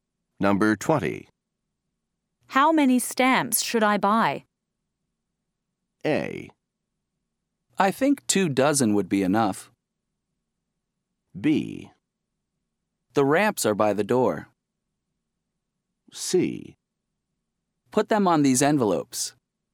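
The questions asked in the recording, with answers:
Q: How many stamps should I buy?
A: A: I think 2 dozen would be enough.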